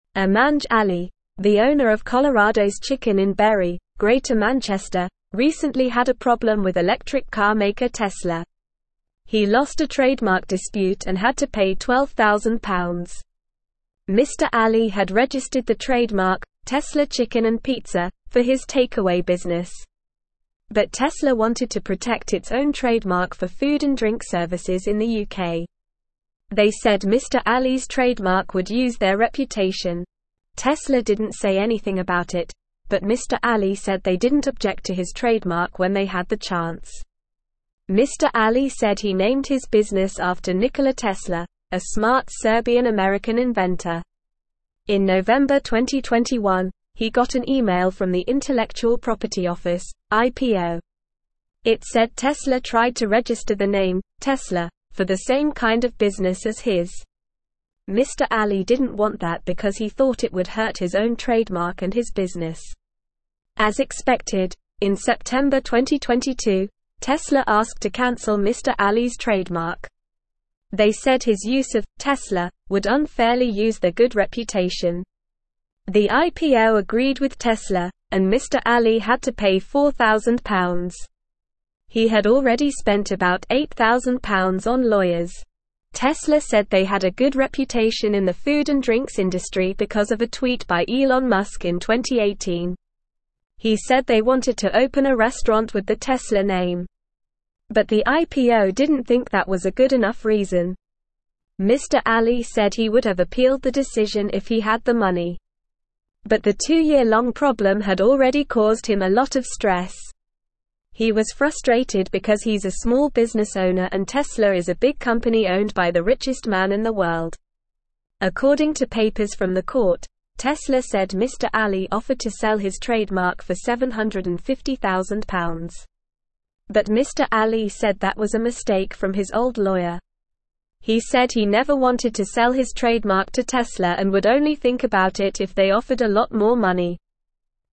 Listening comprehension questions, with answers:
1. Amanj Ali, the (1)______ of Colorado's Chicken in Bury, Greater Manchester,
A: owner

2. recently had a problem with electric car (2)______ (3)______.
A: maker

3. recently had a problem with electric car (2)______ (3)______.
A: Tesla

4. Mr. Ali had (4)______ the trademark "Tesla Chicken & Pizza" for his takeaway business.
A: registered

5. but Mr. Ali said they didn't object to his (5)______ when they had the chance.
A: trademark

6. Mr. Ali said he named his business after Nikola Tesla, a (6)______ Serbian-American (7)______.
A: smart

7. Mr. Ali said he named his business after Nikola Tesla, a (6)______ Serbian-American (7)______.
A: inventor

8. It said Tesla tried to (8)______ the name "Tesla" for the same kind of business as his.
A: register

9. Tesla said they had a good reputation in the food and drinks (9)______ because of a (10)______ by Elon Musk in 2018.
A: industry

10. Tesla said they had a good reputation in the food and drinks (9)______ because of a (10)______ by Elon Musk in 2018.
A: tweet

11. But the IPO didn't think that was a good (11)______ reason.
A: enough

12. Mr. Ali said he would have appealed the (12)______ if he had the money.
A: decision

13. But the two-year-long (13)______ had already caused him a lot of stress.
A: problem

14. Tesla said Mr. Ali (14)______ to sell his trademark for £750,000.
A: offered

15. But Mr. Ali said that was a mistake from his old (15)______.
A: lawyer

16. He said he never (16)______ to sell his trademark to Tesla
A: wanted

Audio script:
Amanj Ali, the owner of Colorado's Chicken in Bury, Greater Manchester, recently had a problem with electric car maker Tesla. He lost a trademark dispute and had to pay £12,000. Mr. Ali had registered the trademark "Tesla Chicken & Pizza" for his takeaway business. But Tesla wanted to protect its own trademark for food and drink services in the UK. They said Mr. Ali's trademark would use their reputation. Tesla didn't say anything about it, but Mr. Ali said they didn't object to his trademark when they had the chance.
Mr. Ali said he named his business after Nikola Tesla, a smart Serbian-American inventor. In November 2021, he got an email from the Intellectual Property Office (IPO). It said Tesla tried to register the name "Tesla" for the same kind of business as his. Mr. Ali didn't want that because he thought it would hurt his own trademark and his business.
As expected, in September 2022, Tesla asked to cancel Mr. Ali's trademark. They said his use of "Tesla" would unfairly use their good reputation. The IPO agreed with Tesla, and Mr. Ali had to pay £4,000. He had already spent about £8,000 on lawyers. Tesla said they had a good reputation in the food and drinks industry because of a tweet by Elon Musk in 2018. He said they wanted to open a restaurant with the Tesla name. But the IPO didn't think that was a good enough reason.
Mr. Ali said he would have appealed the decision if he had the money. But the two-year-long problem had already caused him a lot of stress. He was frustrated because he's a small business owner and Tesla is a big company owned by the richest man in the world. According to papers from the court, Tesla said Mr. Ali offered to sell his trademark for £750,000. But Mr. Ali said that was a mistake from his old lawyer. He said he never wanted to sell his trademark to Tesla and would only think about it if they offered a lot more money.

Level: Level 3